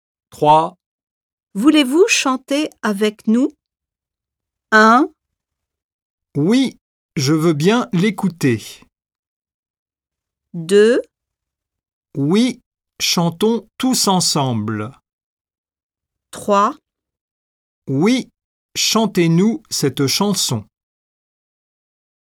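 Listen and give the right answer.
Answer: 2: Oui, chantons tous ensemble.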